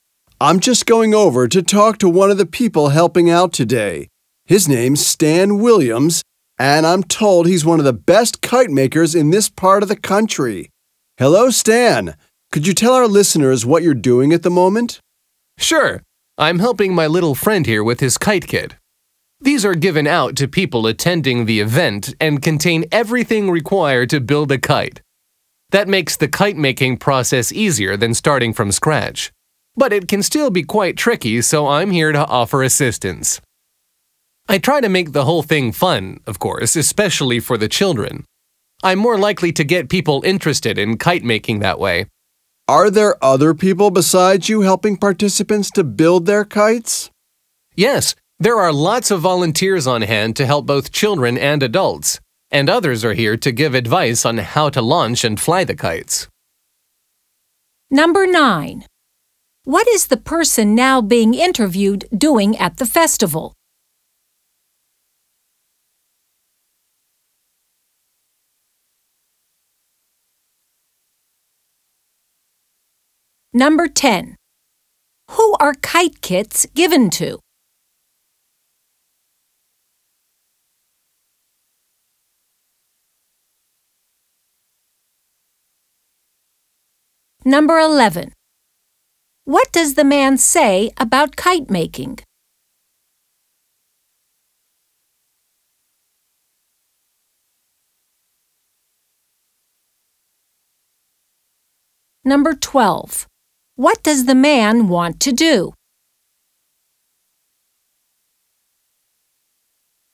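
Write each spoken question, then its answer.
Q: What is the person now being interviewed doing at the festival?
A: Helping people build kites from kits

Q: Who are kite kits given to?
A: People attending the event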